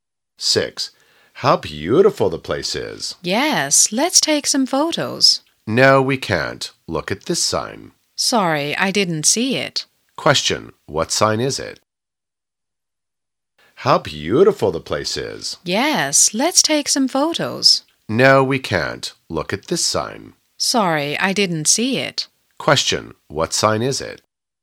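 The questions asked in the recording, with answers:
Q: Question, what sign is it?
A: No photos (you can't take photos here).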